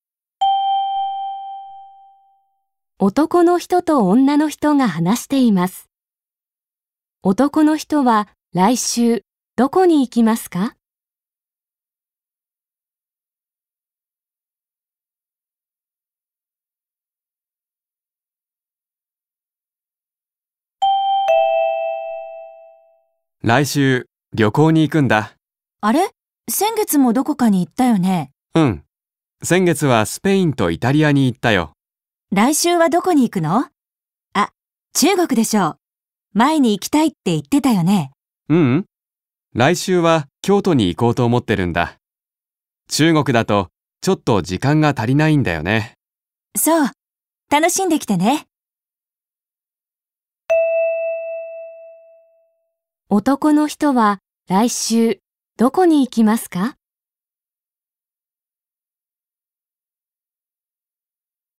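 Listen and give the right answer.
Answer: 京都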